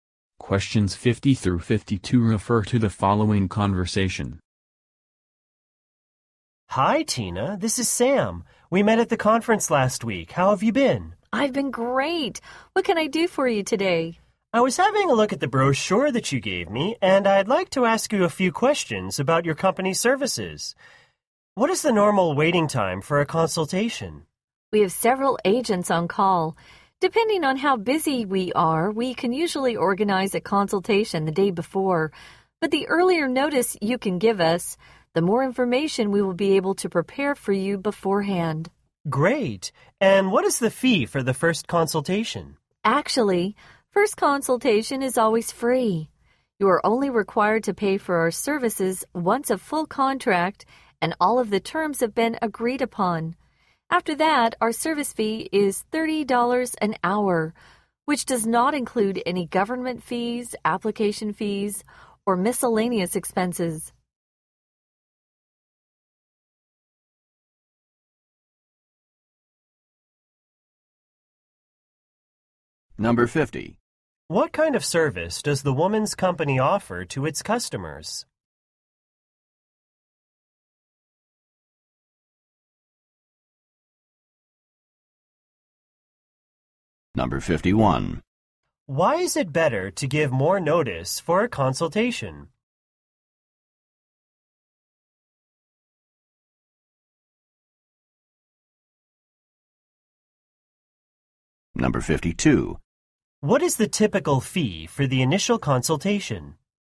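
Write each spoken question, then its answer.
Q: Why is it better to give more notice for a consultation?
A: They can prepare more information beforehand

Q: What is the typical fee for the initial consultation?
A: It is free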